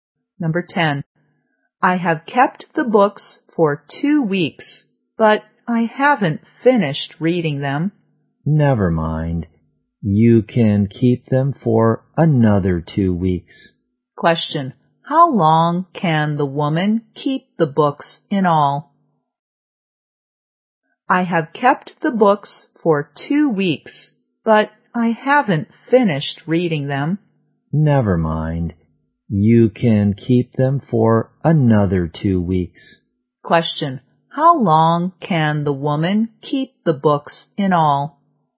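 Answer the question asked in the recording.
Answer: Four weeks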